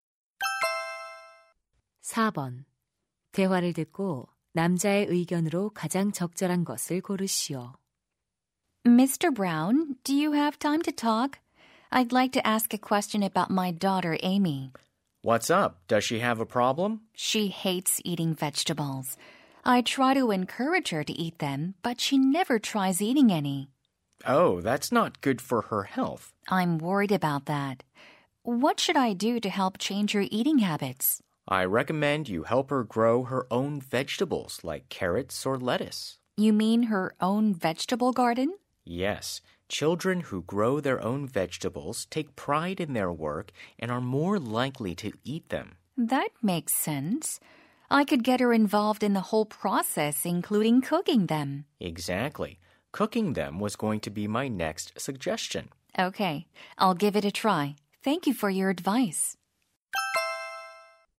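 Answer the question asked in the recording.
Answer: 아이가 직접 채소를 기르면 채소를 더 잘 먹게 된다.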